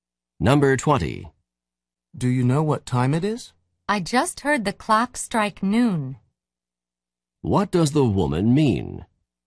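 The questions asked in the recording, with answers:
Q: What does the woman mean?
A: It is twelve o'clock noon.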